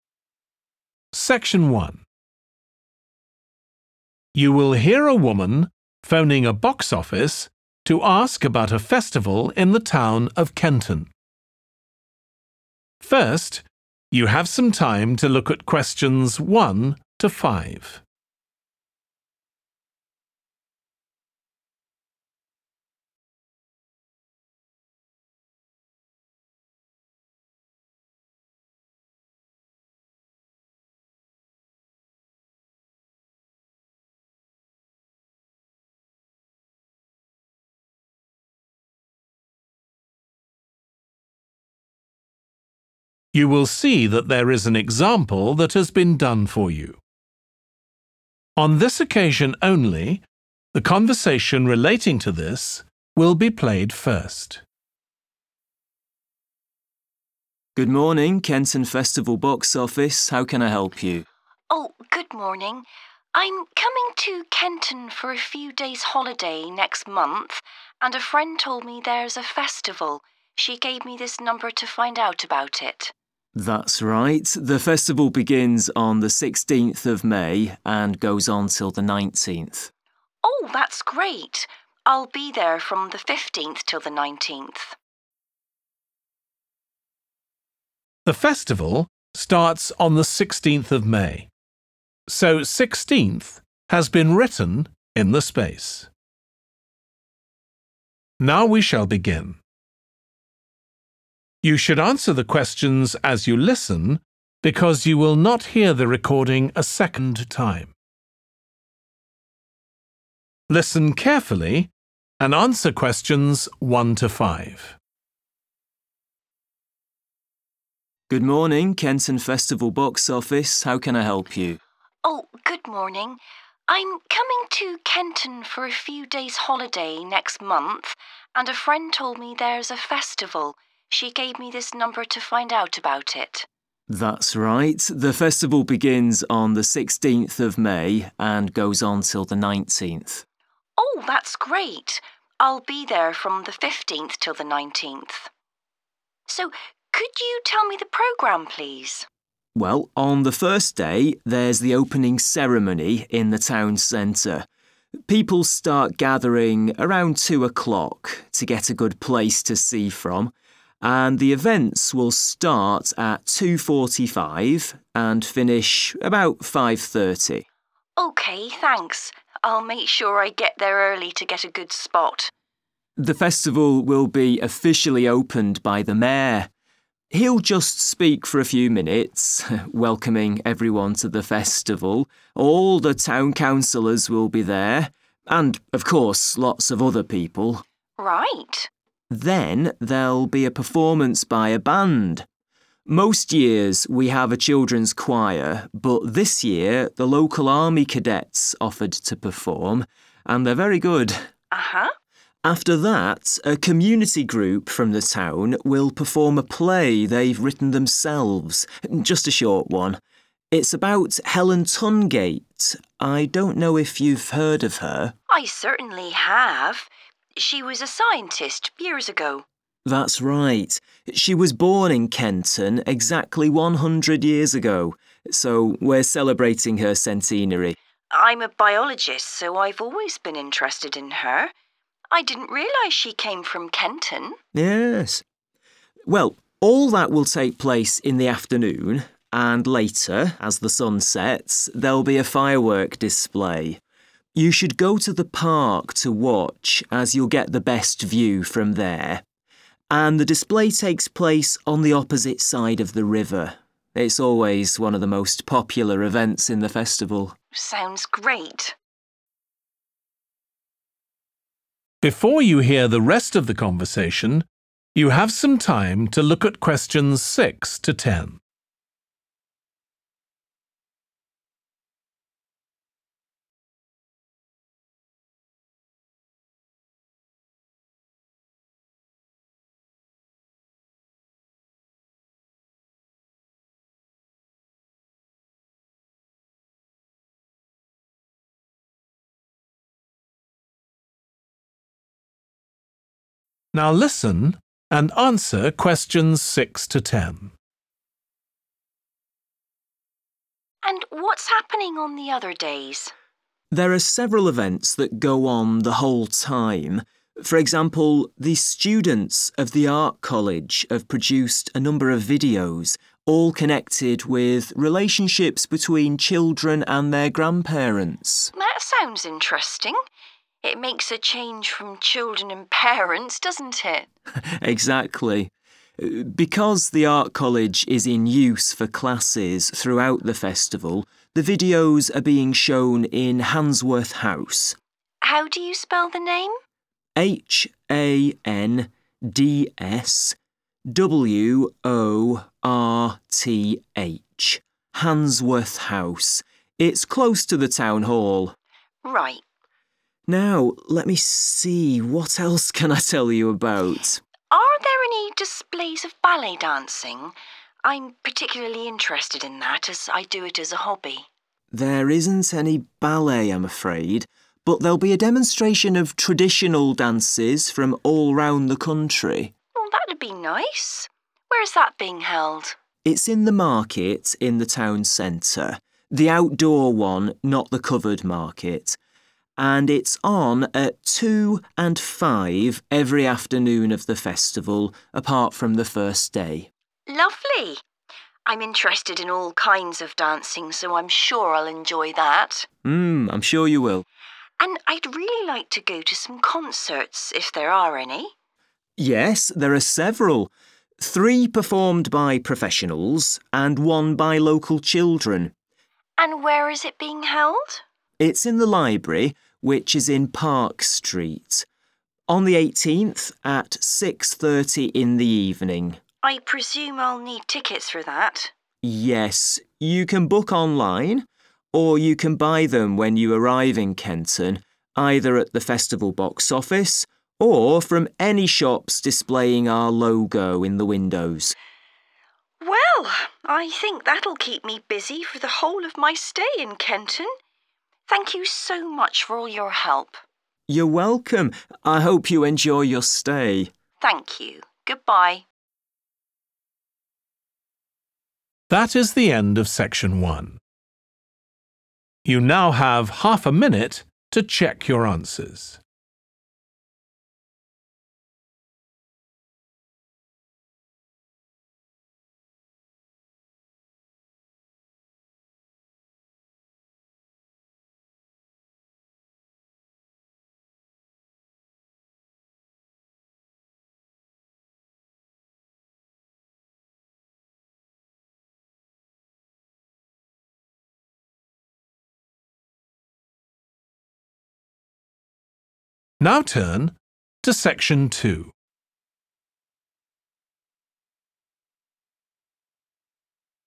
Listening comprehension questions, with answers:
Complete the notes below. Write ONE WORD AND/OR A NUMBER for each answer.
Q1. In town centre, starting at _____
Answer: 2.45

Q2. A _____ will perform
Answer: band

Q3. Performance of a _____ About Helen Tungate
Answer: play

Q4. About Helen Tungate (a _____ )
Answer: scientist

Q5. Evening fireworks display situated across the _____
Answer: river

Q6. Video about relationships that children have with their _____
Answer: grandparents

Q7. Venue: _____ House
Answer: Handsworth

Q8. Performance of _____ Dances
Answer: traditional

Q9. Venue: the _____ market in the town centre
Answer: outdoor

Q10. Tickets available online from festival box office and from shops which have the festival _____ in their windows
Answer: logo

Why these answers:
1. The transcript mentions that the events will begin at 2:45. Answer Explanation: The answer indicates the specific time of 2:45. Reason For Correctness: The correct answer matches the time mentioned in the excerpt, showing that the events will start at 2:45.
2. The transcript mentions that there will be a performance by a group of musicians playing instruments together. Answer Explanation: The answer 'band' refers to a group of musicians who play music together. Reason For Correctness: The correct answer is 'band' because it fits the context of a musical performance involving multiple musicians, which is commonly referred to as a band.
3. The transcript is saying that after the opening ceremony, a community group from the town will perform a short play that they wrote themselves. The play is about Helen Tungate. Answer Explanation: The answer 'play' is a type of performance. Reason For Correctness: The correct answer 'play' is correct because according to the excerpt, the community group will perform a play about Helen Tungate.
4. The transcript says that at a point in the past, 'She' worked in a field called science. Answer Explanation: The answer 'scientist' refers to a person who studies or works in the field of science. Reason For Correctness: The correct answer is 'scientist' because the word 'scientist' matches the description of someone involved in the field of science, which aligns with the information provided in the excerpt where 'She' is mentioned to have been a scientist.
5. The transcript says that a fireworks display will happen at a park, and it will be best seen from the park because the display is on the other side of a river. Answer Explanation: The answer means the fireworks are across the water. Reason For Correctness: The correct answer is 'river' because the fireworks are being displayed across the river. The phrase 'the opposite side of the river' tells us the fireworks are across the river from the park.
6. The transcript talks about students from an art college making videos. These videos are about the relationships that children have with their grandparents. Answer Explanation: The answer is 'grandparents'. This word means the parents of a person's mother or father. Reason For Correctness: The correct answer is 'grandparents' because it matches the subject of the videos mentioned in the transcript, which focus on the connections between children and their grandparents.
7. The transcript indicates that the videos are being shown at Handsworth House. Answer Explanation: The answer 'Handsworth' refers to the location where the videos are being shown. Reason For Correctness: The correct answer matches the location mentioned in the excerpt, confirming that the videos are indeed being shown at Handsworth House during the festival.
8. The transcript says there will be a presentation of dances from many different places in the country. Answer Explanation: The answer 'traditional' means dances that have been performed for a long time and are part of a culture. Reason For Correctness: The correct answer 'traditional' is right because the excerpt mentions dances from all over the country, which likely means dances that have been part of those areas for a long time.
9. The transcript says the market is in the town center and it's not covered. Answer Explanation: The answer 'outdoor' means 'not covered'. Reason For Correctness: The correct answer 'outdoor' means 'not covered' and is the correct answer because the excerpt says the market is not covered.
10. The transcript says that people can buy festival tickets online or in person in Kenton at the festival box office or at shops that have a special sign. Answer Explanation: The answer is 'logo', which means a special symbol or picture that represents a company or organization. Reason For Correctness: The correct answer is 'logo' because the excerpt mentions that people can buy tickets at shops that have the festival 'logo' in their windows.

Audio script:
MAN: Good morning, Kenton Festival box office. How can I help you?
WOMAN: Oh, good morning. I'm coming to Kenton for a few days' holiday next month, and a friend told me there's a festival. She gave me this number to find out about it.
MAN: That's right, the festival begins on the 16th of May and goes on till the 19th.
WOMAN: Oh, that's great. I'll be there from the 15th till the 19th. So could you tell me the programme, please?
MAN: Well, on the first day, there's the opening ceremony, in the town centre. People start gathering around 2 o'clock, to get a good place to see from, and the events will start at 2.45, and finish about 5.30.
WOMAN: OK, thanks. I'll make sure I get there early to get a good spot.
MAN: The festival will be officially opened by the mayor. He'll just speak for a few minutes, welcoming everyone to the festival. All the town councillors will be there, and of course lots of other people.
WOMAN: Right.
MAN: Then there'll be a performance by a band. Most years we have a children's choir, but this year the local army cadets offered to perform, and they're very good.
MAN: After that, a community group from the town will perform a play they've written themselves, just a short one. It's about Helen Tungate. I don't know if you've heard of her?
WOMAN: I certainly have. She was a scientist years ago.
MAN: That's right. She was born in Kenton exactly 100 years ago, so we're celebrating her centenary.
WOMAN: I'm a biologist, so I've always been interested in her, I didn't realise she came from Kenton.
MAN: Yes. Well, all that will take place in the afternoon, and later, as the sun sets, there'll be a firework display. You should go to the park to watch, as you'll get the best view from there, and the display takes place on the opposite side of the river. It's always one of the most popular events in the festival.
WOMAN: Sounds great.
WOMAN: And what's happening on the other days?
MAN: There are several events that go on the whole time. For example, the students of the art college have produced a number of videos, all connected with relationships between children and their grandparents.
WOMAN: That sounds interesting. It makes a change from children and parents, doesn't it!
MAN: Exactly. Because the art college is in use for classes, throughout the festival, the videos are being shown in Handsworth House.
WOMAN: How do you spell the name?
MAN: H-A-N-D-S-W-O-R-T-H. Handsworth House. It's close to the Town Hall.
WOMAN: Right.
MAN: Now let me see, what else can I tell you about?
WOMAN: Are there any displays of ballet dancing? I'm particularly interested in that as I do it as a hobby.
MAN: There isn't any ballet, I'm afraid, but there'll be a demonstration of traditional dances from all round the country.
WOMAN: Oh, that'd be nice. Where's that being held?
MAN: It's in the market in the town centre – the outdoor one, not the covered market. And it's on at 2 and 5 every afternoon of the festival, apart from the first day.
WOMAN: Lovely. I'm interested in all kinds of dancing, so I'm sure I'll enjoy that!
MAN: Mmm. I'm sure you will.
WOMAN: And I'd really like to go to some concerts, if there are any.
Three performed by professionals, and one by local children.
WOMAN: And where is it being held?
MAN: It's in the library, which is in Part Street. On the 18th, at 6.30 in the evening.
WOMAN: I presume I'll need tickets for that.
MAN: Yes, you can book online, or you can buy them when you arrive in Kenton, either at the festival box office, or from any shops displaying our logo in the windows.
WOMAN: Well, I think that'll keep me busy for the whole of my stay in Kenton. Thank you so much for all your help.
MAN: You're welcome. I hope you enjoy your stay.
WOMAN: Thank you. Goodbye.